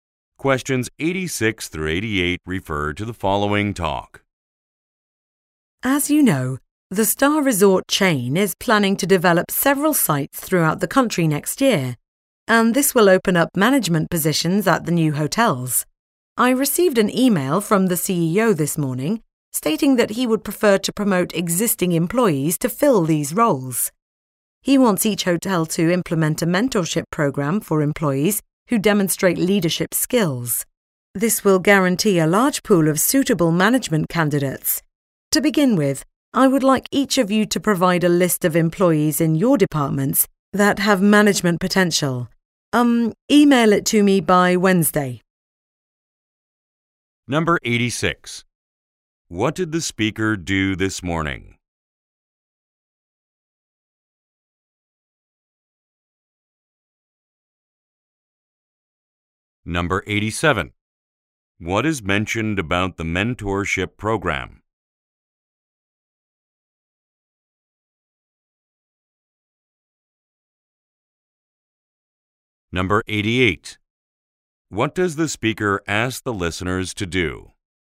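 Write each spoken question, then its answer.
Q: What did the speaker do this morning?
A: Received an email from the CEO

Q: What is mentioned about the mentorship program?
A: It will guarantee a large pool of suitable management candidates

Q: What does the speaker ask the listeners to do?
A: Email a list of employees with management potential by Wednesday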